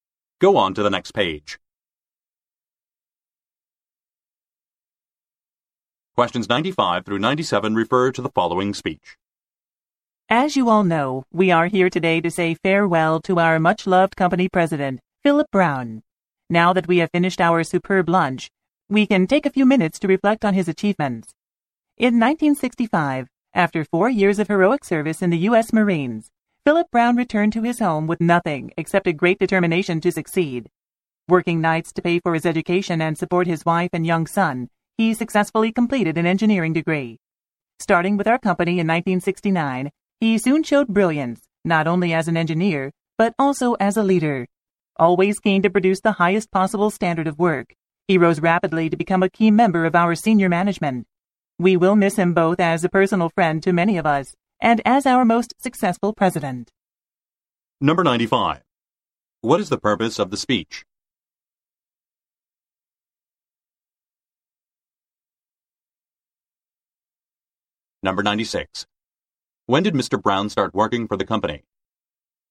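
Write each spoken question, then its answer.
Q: What is the purpose of the speech?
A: To say farewell to the retiring company president, Philip Brown

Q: When did Mr. Brown start working for the company?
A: In 1969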